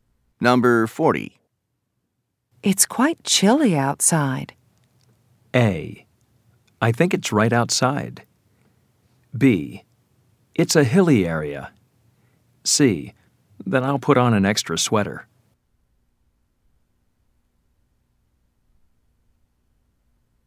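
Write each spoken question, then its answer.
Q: It's quite chilly outside.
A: C: Then I'll put on an extra sweater.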